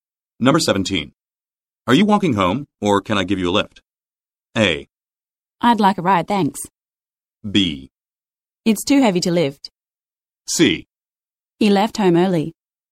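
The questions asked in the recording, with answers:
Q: Are you walking home, or can I give you a lift?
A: A: I'd like a ride, thanks.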